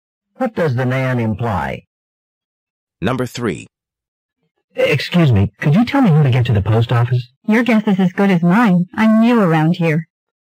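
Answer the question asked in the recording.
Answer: She doesn't know where the post office is.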